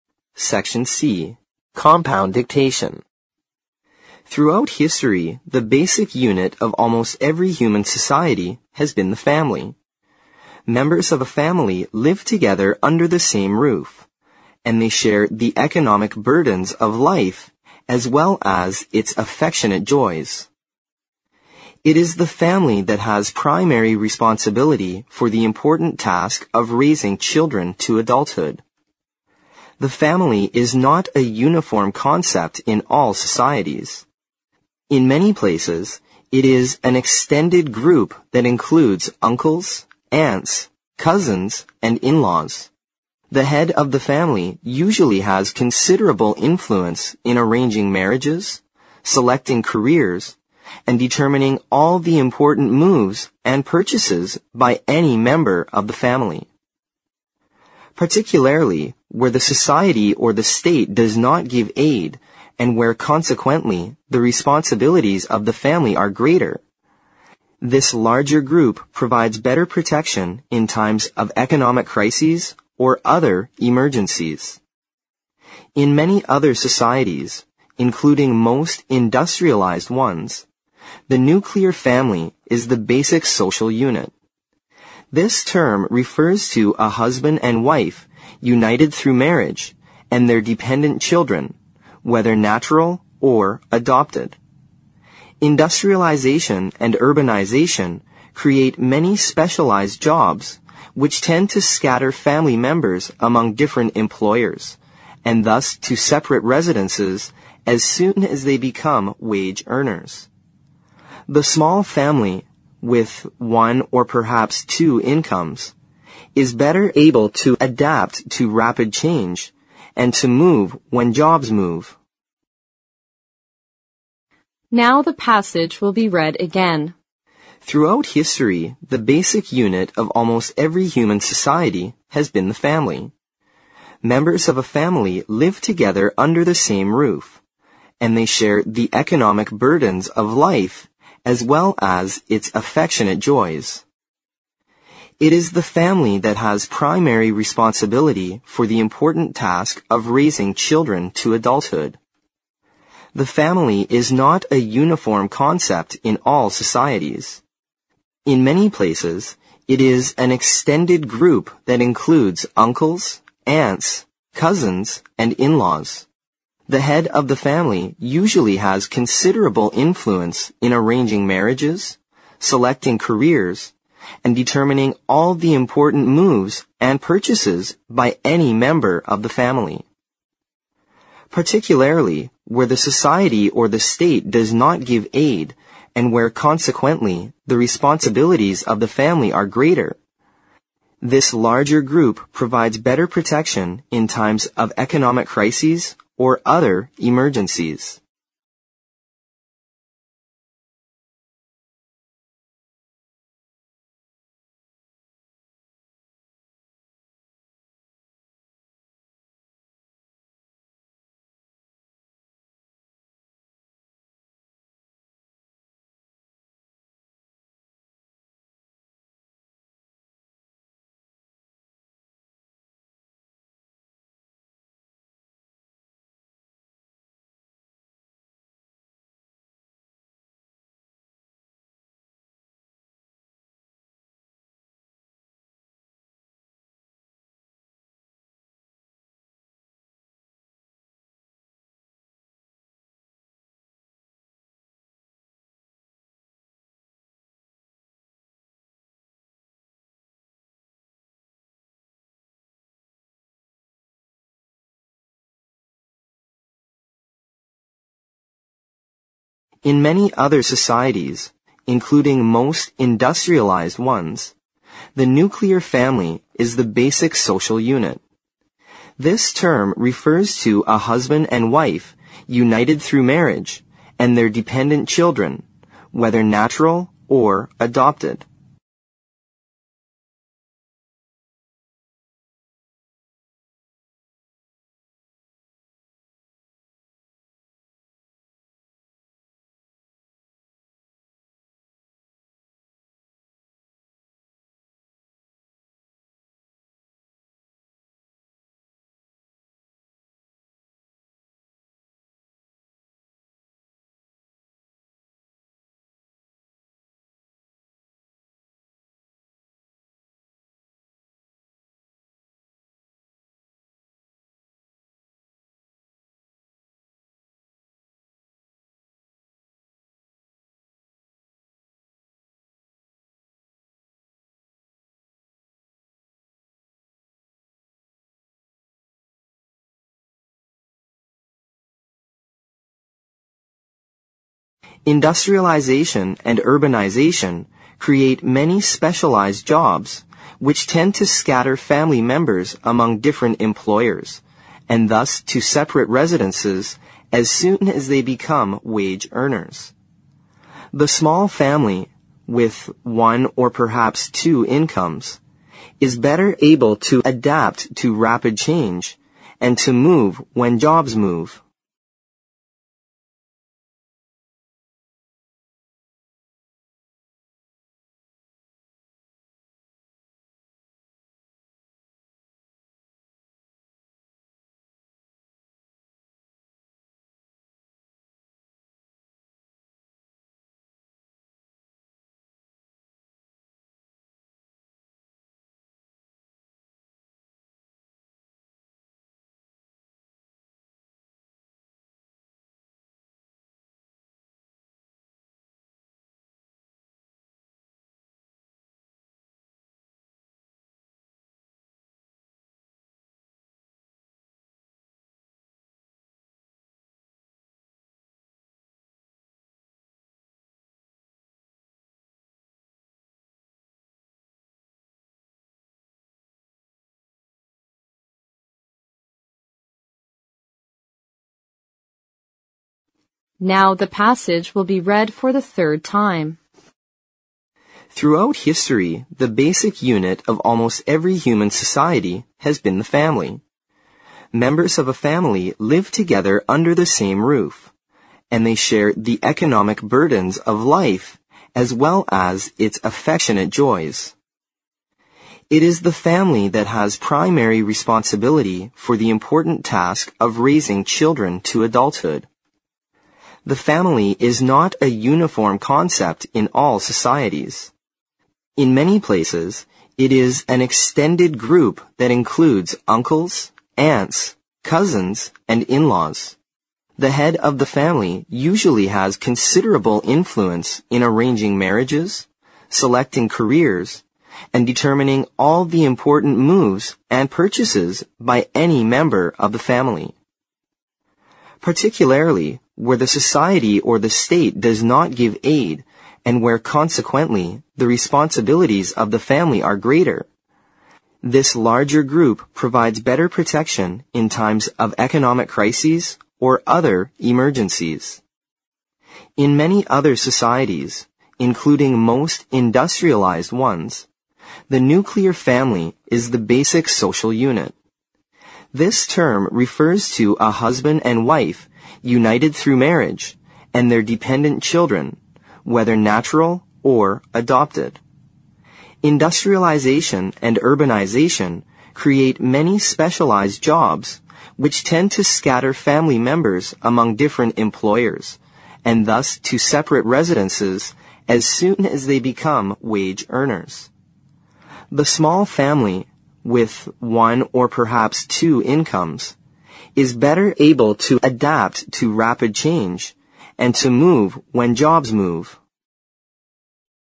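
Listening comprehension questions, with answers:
Section C Compound Dictation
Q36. Members of a family live together under the same roof, and they share the economic (36) ______ of life as well as its affectionate joys.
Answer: burdens

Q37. It is the family that has (37) ______ responsibility for the important task of raising children to adulthood.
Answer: primary

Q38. In many places it is an (38) ______ group that includes uncles, aunts, (39) ______ and in-laws.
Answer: extended

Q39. In many places it is an (38) ______ group that includes uncles, aunts, (39) ______ and in-laws.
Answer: cousins

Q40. The head of the family usually has considerable influence in arranging marriages, selecting careers and (40) ______ all the important moves and (41) ______ by any member of the family.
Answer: determining

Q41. The head of the family usually has considerable influence in arranging marriages, selecting careers and (40) ______ all the important moves and (41) ______ by any member of the family.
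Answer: purchases

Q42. (42) ______ where the society or the state does not give aid and where (43) ______ the responsibilities of the family are greater, (44) _______________________________________________________ .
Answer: Particularly

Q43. (42) ______ where the society or the state does not give aid and where (43) ______ the responsibilities of the family are greater, (44) _______________________________________________________ .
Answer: consequently

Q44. (42) ______ where the society or the state does not give aid and where (43) ______ the responsibilities of the family are greater, (44) _______________________________________________________ .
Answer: this larger group provides better protection in times of economic crises or other emergencies

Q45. (45) _____________________________________________________________________ .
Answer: This term refers to a husband and wife united through marriage and their dependent children, whether natural or adopted

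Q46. (46) _______________________________________________________________ .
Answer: The small family, with one or perhaps two incomes, is better able to adapt to rapid change and to move when jobs move

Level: 四级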